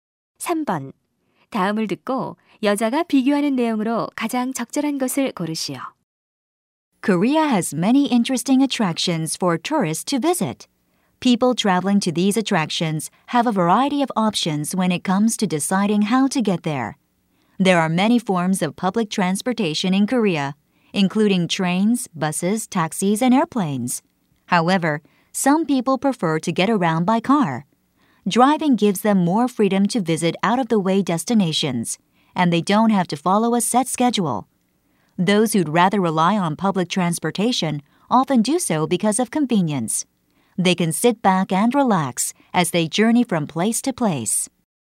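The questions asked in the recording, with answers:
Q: 다음을 듣고 여자가 비교하는 내용으로 가장 적절한 것을 고르시오.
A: 자가용 여행과 대중교통 이용 여행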